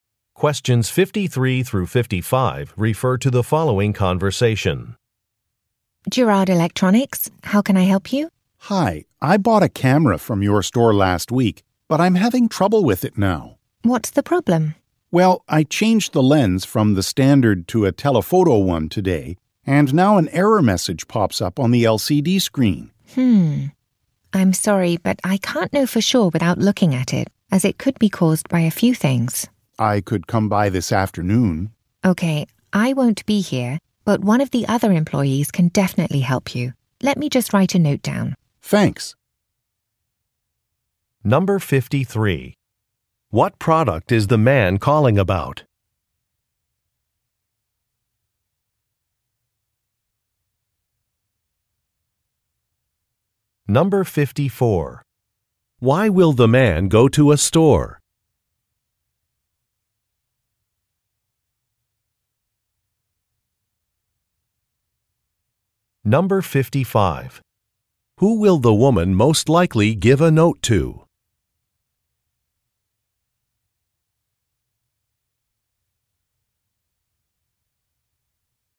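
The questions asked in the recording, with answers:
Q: What product is the man calling about?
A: A camera

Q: Why will the man go to a store?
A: To have his camera checked because of an error message

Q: Who will the woman most likely give a note to?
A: Another employee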